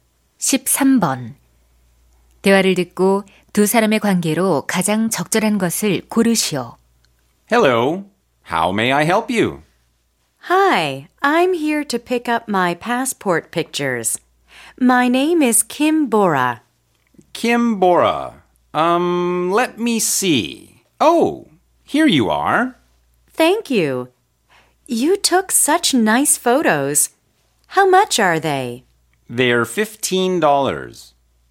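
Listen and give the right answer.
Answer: 사진사와 손님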